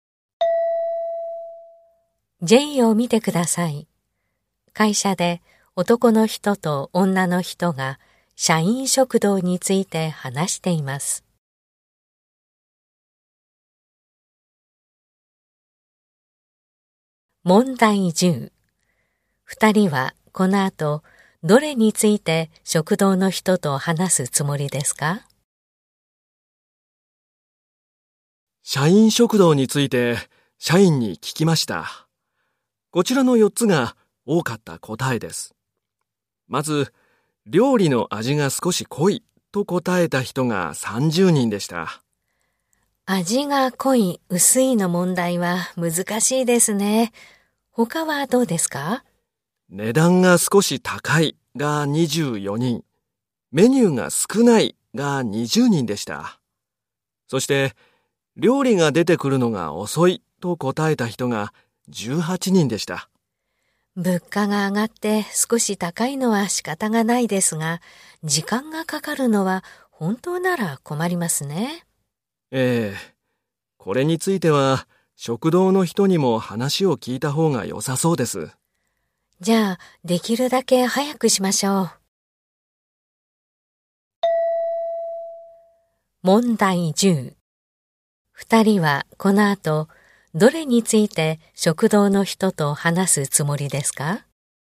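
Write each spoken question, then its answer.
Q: 二人はこの後どれについて食堂の人と話すつもりですか?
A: 料理が出てくるのが遅いこと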